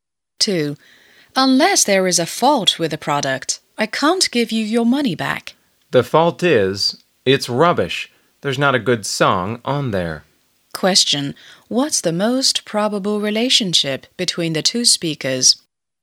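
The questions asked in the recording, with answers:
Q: What's the most probable relationship between the two speakers?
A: Shop assistant and customer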